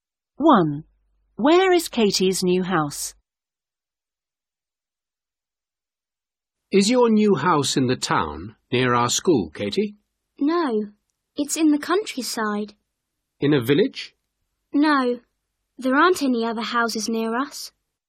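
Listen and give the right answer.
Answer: In the countryside, with no other houses near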